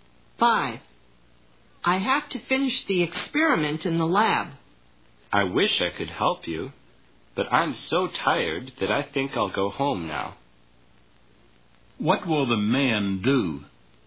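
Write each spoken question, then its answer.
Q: What will the man do?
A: Go home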